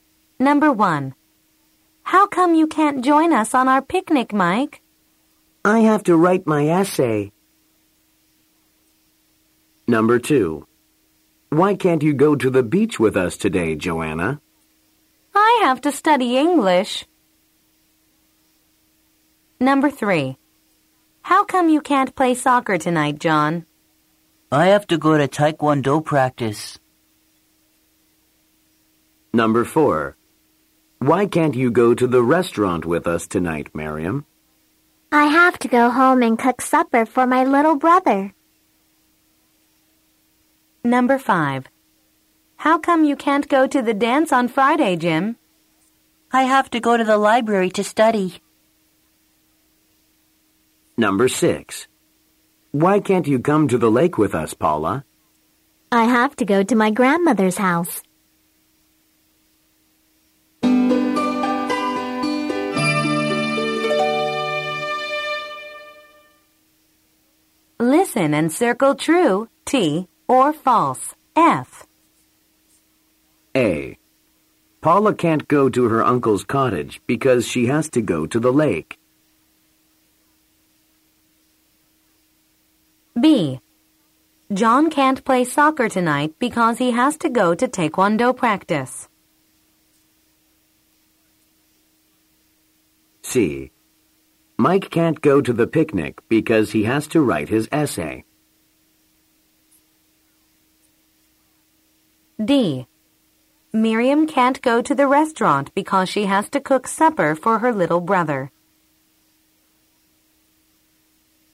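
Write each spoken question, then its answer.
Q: Paula can't go to her uncle's cottage because she has to go to the lake.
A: F (false)

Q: John can't play soccer tonight because he has to go to Taekwondo practice.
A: T (true)

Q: Mike can't go to the picnic because he has to write his essay.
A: T (true)

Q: Miriam can't go to the restaurant because she has to cook supper for her little brother.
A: T (true)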